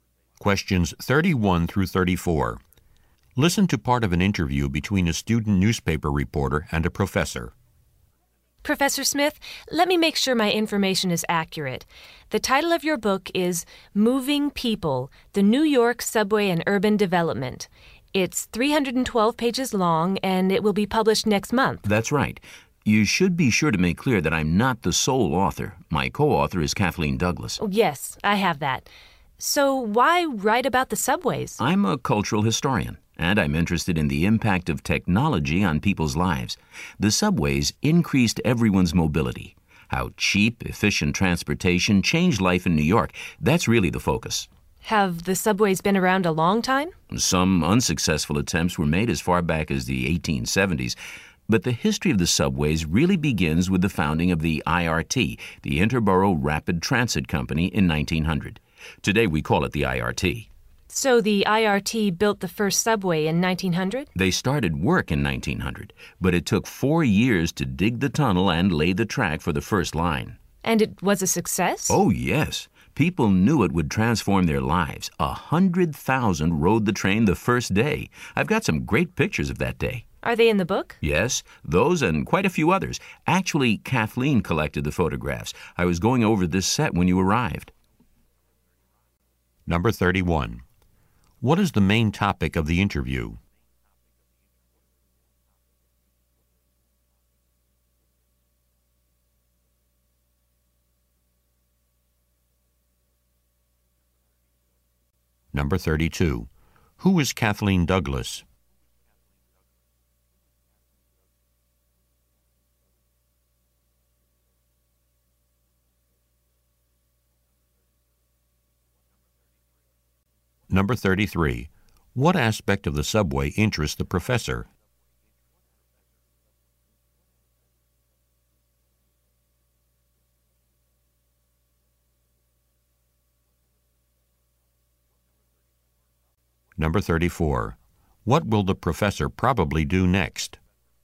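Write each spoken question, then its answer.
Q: What is the main topic of the interview?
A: The professor's new book about the New York subway and urban development

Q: Who is Kathleen Douglas?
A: The professor's co-author, who collected the photographs

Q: What aspect of the subway interests the professor?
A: Its impact on people's lives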